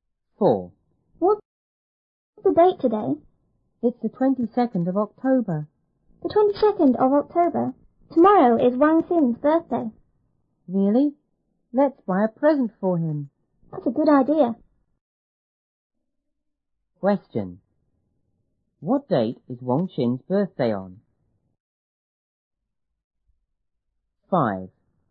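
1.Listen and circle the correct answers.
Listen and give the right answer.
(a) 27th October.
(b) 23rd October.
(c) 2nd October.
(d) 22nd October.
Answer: (b) 23rd October.

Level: 初中英语广州版1B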